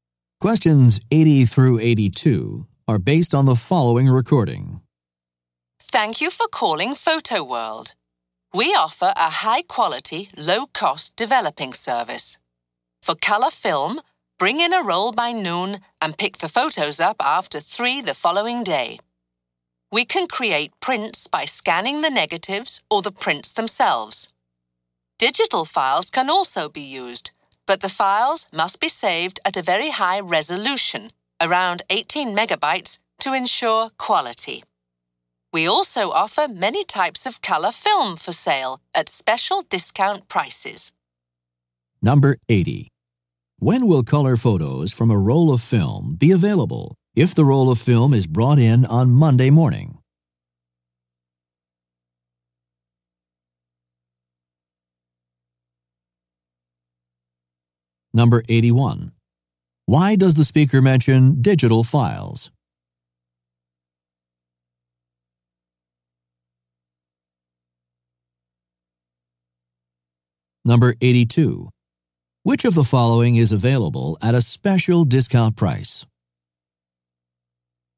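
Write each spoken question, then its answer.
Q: When will color photos from a roll of film be available if the roll of film is brought in on Monday morning?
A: After 3 on Tuesday

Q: Why does the speaker mention digital files?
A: They can be used to make prints if saved at high resolution

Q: Which of the following is available at a special discount price?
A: Color film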